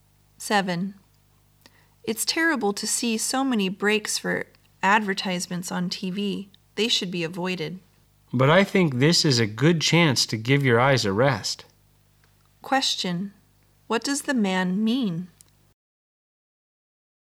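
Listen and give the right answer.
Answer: TV ad breaks give viewers' eyes a rest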